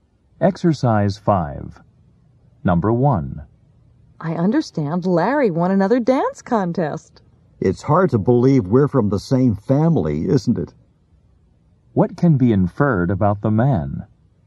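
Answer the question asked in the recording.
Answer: He is not a good dancer, unlike Larry.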